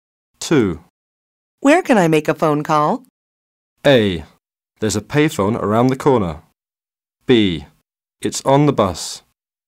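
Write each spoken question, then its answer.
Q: Where can I make a phone call?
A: A: There's a payphone around the corner.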